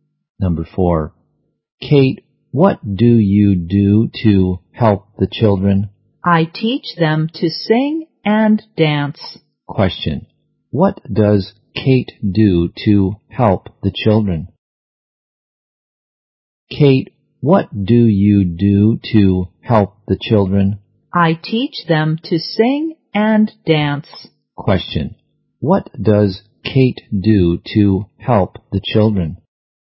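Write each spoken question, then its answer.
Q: what does Kate do to help the children?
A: She teaches them to sing and dance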